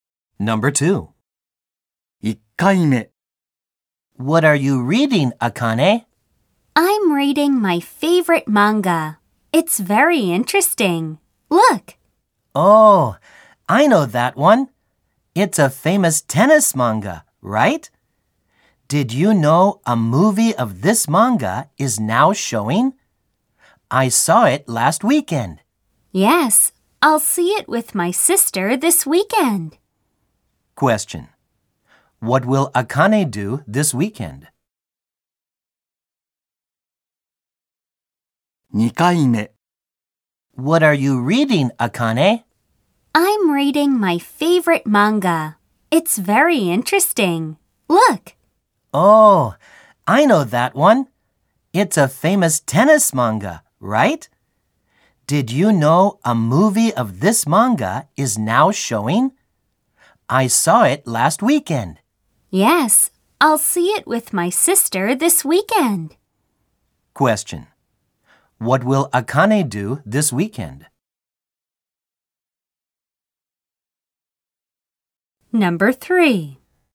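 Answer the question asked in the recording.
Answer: She will see the movie of the tennis manga with her sister.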